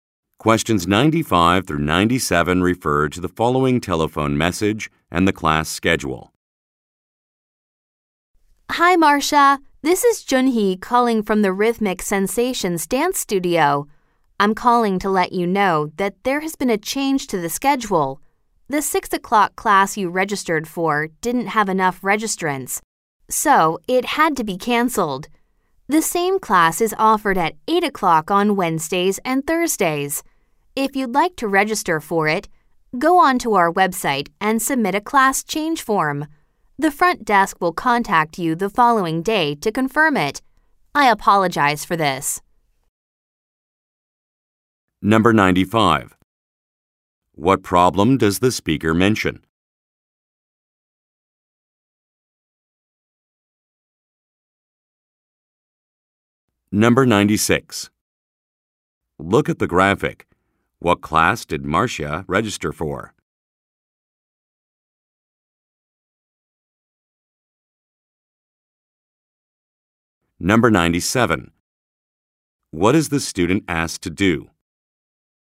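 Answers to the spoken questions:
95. A class was canceled because not enough people registered.
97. Submit a class change form on the website.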